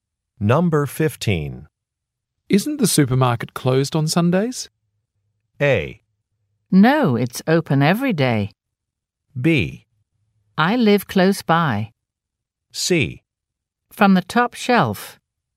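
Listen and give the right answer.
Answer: A: No, it's open every day.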